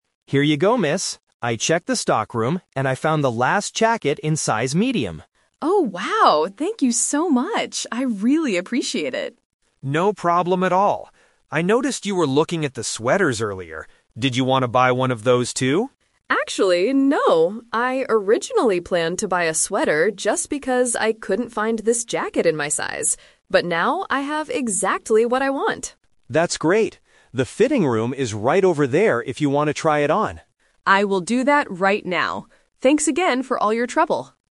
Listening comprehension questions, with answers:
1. What did the shop assistant find for the customer?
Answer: A size Medium jacket.

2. Why did the customer look at the sweaters earlier?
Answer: Because she thought she couldn't get the jacket.

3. What is the customer going to do next?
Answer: Try the jacket on in the fitting room.

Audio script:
Assistant: Here you go, miss. I checked the stockroom, and I found the last jacket in size Medium.
Customer: Oh, wow! Thank you so much! I really appreciate it.
Assistant: No problem at all. I noticed you were looking at the sweaters earlier. Did you want to buy one of those too?
Customer: Actually, no. I originally planned to buy a sweater just because I couldn't find this jacket in my size. But now I have exactly what I want!
Assistant: That's great! The fitting room is right over there if you want to try it on.